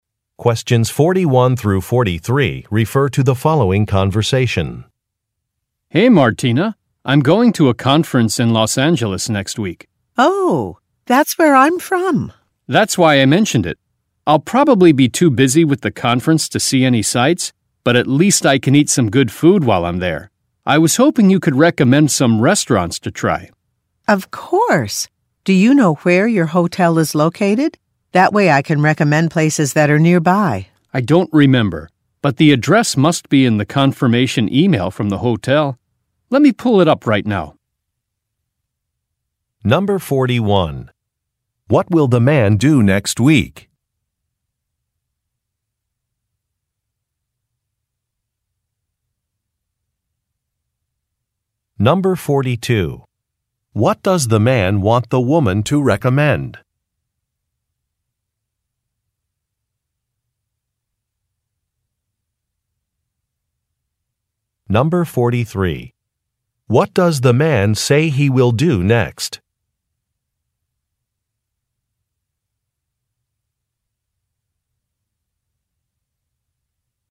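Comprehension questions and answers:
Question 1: What will the man do next week?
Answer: Attend a conference

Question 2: What does the man want the woman to recommend?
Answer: Restaurants

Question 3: What does the man say he will do next?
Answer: Look up an address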